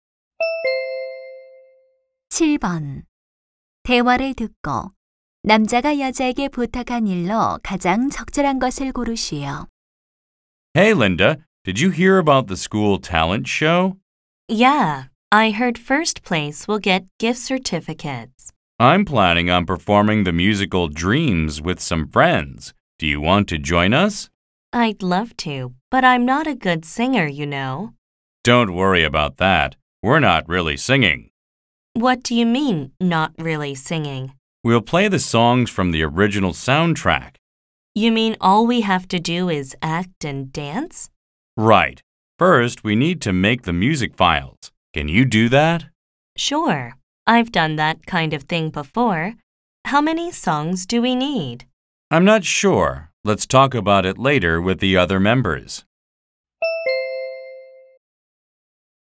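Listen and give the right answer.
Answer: 공연용 음악 파일 만들기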